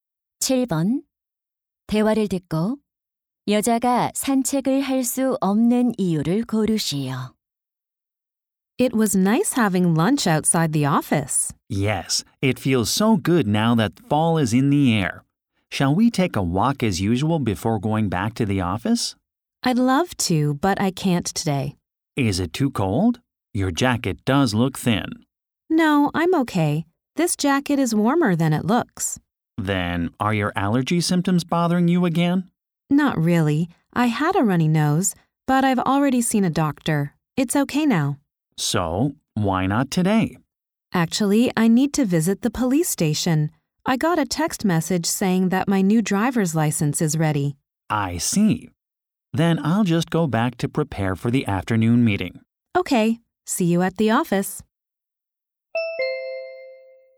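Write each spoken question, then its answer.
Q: 대화를 듣고 여자가 산책을 할 수 없는 이유를 고르시오.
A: 새 운전면허증을 받으러 경찰서에 가야 해서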